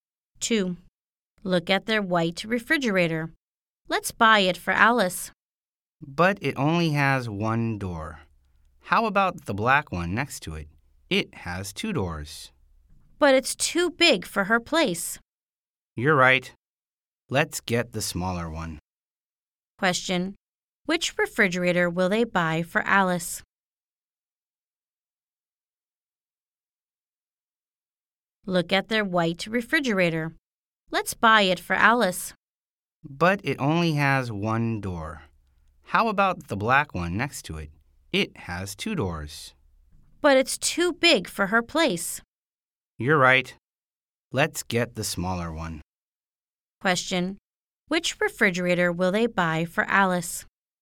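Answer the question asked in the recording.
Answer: The white one (the smaller one with one door)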